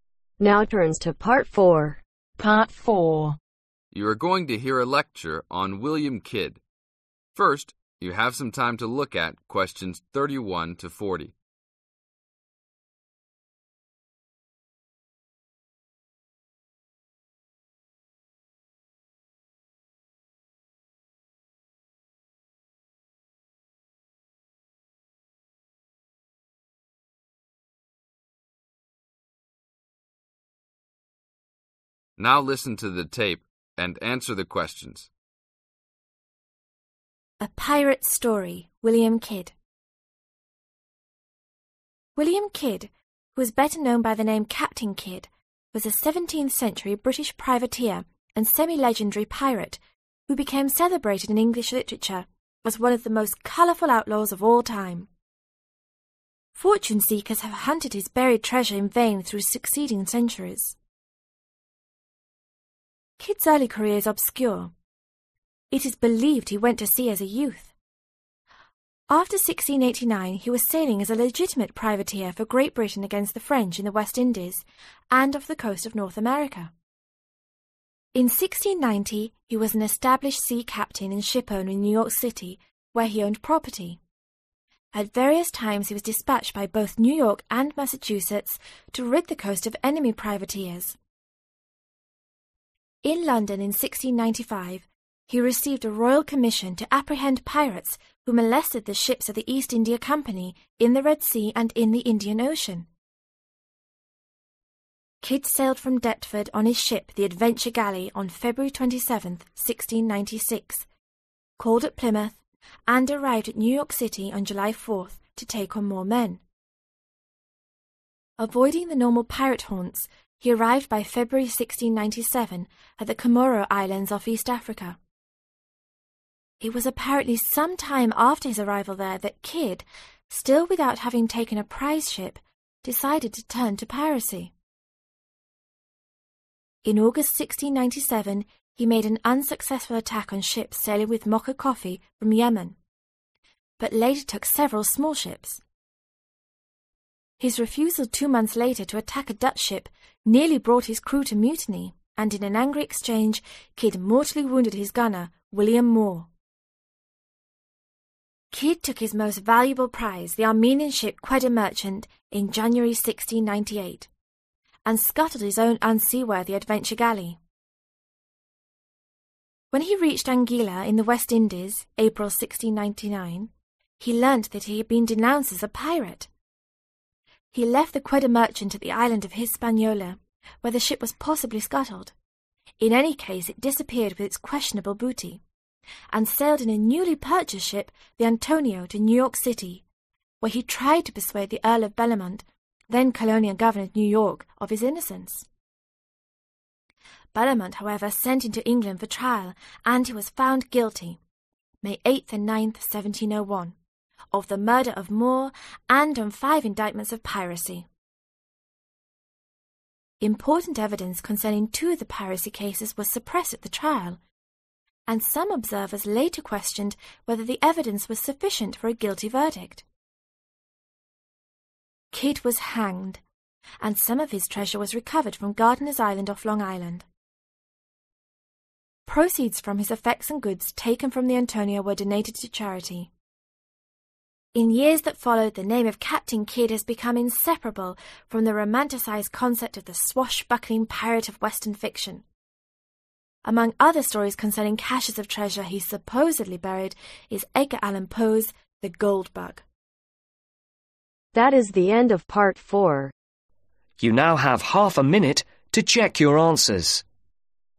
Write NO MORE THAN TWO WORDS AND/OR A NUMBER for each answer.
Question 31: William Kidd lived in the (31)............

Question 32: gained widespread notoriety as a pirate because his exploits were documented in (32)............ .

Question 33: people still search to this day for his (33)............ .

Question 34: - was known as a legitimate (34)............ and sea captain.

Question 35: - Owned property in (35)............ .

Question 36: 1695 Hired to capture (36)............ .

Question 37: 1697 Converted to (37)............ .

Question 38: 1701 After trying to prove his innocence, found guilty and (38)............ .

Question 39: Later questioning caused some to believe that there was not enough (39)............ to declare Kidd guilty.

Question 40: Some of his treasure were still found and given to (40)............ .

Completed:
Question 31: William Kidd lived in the 17th Century
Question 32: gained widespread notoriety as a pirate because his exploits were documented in English Literature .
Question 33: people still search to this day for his (buried) treasure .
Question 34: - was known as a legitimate Privateer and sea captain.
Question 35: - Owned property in New York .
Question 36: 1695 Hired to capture Pirates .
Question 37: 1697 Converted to Piracy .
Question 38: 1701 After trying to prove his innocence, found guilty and Hanged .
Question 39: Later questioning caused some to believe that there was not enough Evidence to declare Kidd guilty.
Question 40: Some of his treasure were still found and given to Charity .